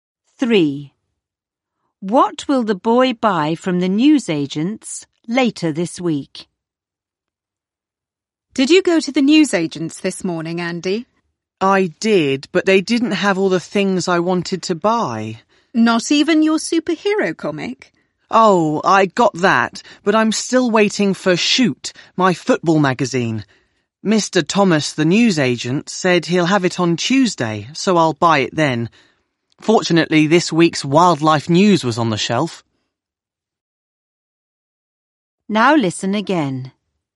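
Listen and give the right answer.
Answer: His football magazine, Shoot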